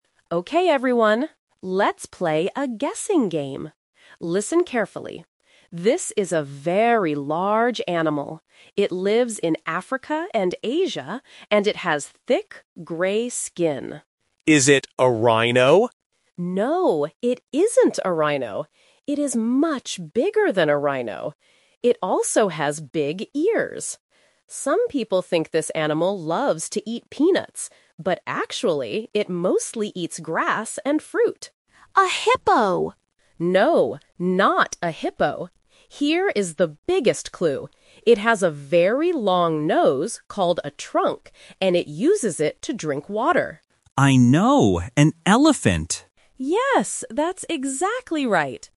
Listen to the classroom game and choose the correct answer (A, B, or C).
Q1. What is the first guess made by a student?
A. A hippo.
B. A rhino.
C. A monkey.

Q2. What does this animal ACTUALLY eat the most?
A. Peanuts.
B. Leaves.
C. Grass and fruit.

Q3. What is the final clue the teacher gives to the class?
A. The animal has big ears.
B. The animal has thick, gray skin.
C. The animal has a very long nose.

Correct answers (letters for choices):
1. B
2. C
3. C

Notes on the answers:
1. After the teacher gives the first clues, Student 1 asks, "Is it a rhino?" The Trap: Option (A) is a trap because "hippo" is guessed later by Student 2. Option (C) is a common animal but is never mentioned in the audio.
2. Option (A) is a trap because "peanuts" are mentioned, but the teacher says that is just what "some people think," not what it actually eats. Option (B) is not mentioned.
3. The teacher says, "Here is the biggest clue: It has a very long nose called a trunk..." The Trap: Option (A) and Option (B) are both true facts about the animal that the teacher mentions, but they are given at the beginning of the game, not as the final clue.

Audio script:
Teacher: Okay everyone, let's play a guessing game! Listen carefully. This is a very large animal. It lives in Africa and Asia, and it has thick, gray skin.
Student 1: Is it a rhino?
Teacher: No, it isn't a rhino! It is much bigger than a rhino. It also has big ears. Some people think this animal loves to eat peanuts, but actually, it mostly eats grass and fruit.
Student 2: A hippo!
Teacher: No, not a hippo. Here is the biggest clue: It has a very long nose called a trunk, and it uses it to drink water.